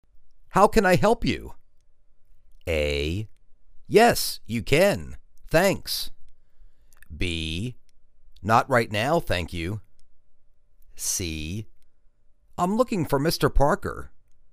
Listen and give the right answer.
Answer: I'm looking for Mr. Parker.